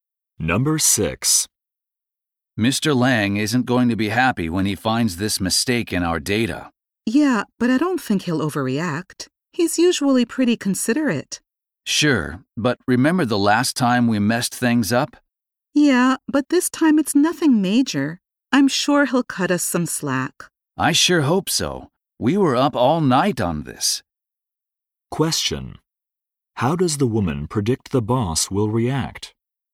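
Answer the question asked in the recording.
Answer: He will be understanding and won't overreact.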